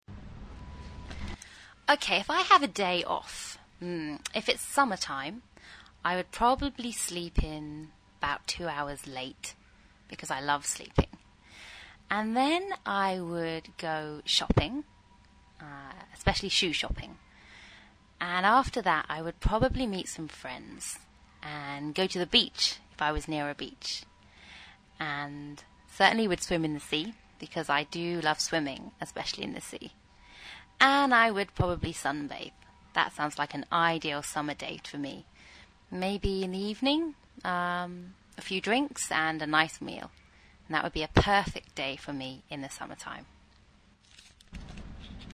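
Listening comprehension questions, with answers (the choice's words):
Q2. What does she like to buy?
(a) CDs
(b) Shoes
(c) Jewelry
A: Shoes

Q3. Where would she go with her friends?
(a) The lake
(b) The pool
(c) The beach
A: The beach

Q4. What would she do ?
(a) Swim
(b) Sunbathe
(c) Both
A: Both

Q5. What would she do in the evening ?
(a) Go dancing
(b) Have a meal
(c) Go bowling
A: Have a meal

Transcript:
Nicola:OK, if I have a day off, if it's summer time, I would probably sleep in about two hours late because I love sleeping, and then I would go shopping, especially shoe shopping and after that I would probably meet some friends and go to the beach, if I was near a beach, and certainly would swim in the sea because I do love swimming, especially in the sea, and I would probably sunbathe. That sounds like an ideal summer day to me, maybe in the evening a few drinks and a nice meal and that would be a perfect day for me in the summer time.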